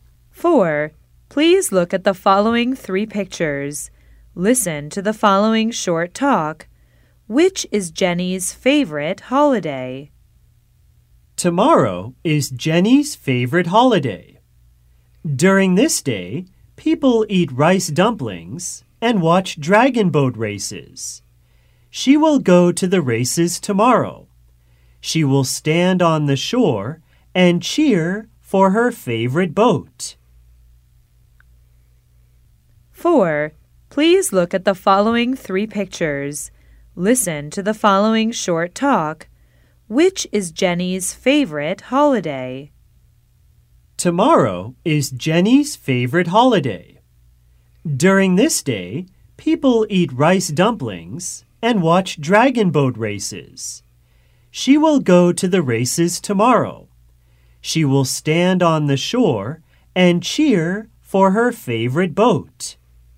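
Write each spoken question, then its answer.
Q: Which is Jenny's favorite holiday?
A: Dragon Boat Festival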